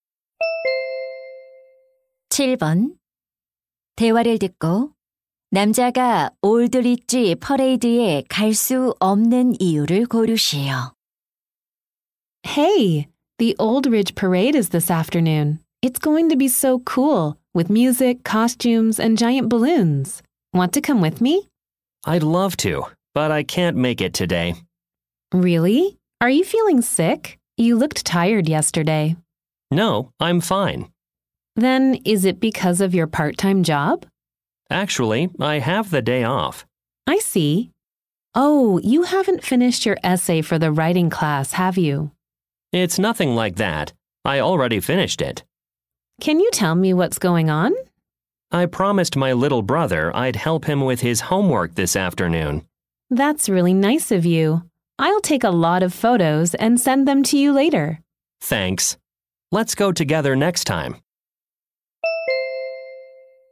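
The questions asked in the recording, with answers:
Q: 대화를 듣고 남자가 올드리지 퍼레이드에 갈 수 없는 이유를 고르시오.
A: 남동생의 숙제를 도와주기로 약속해서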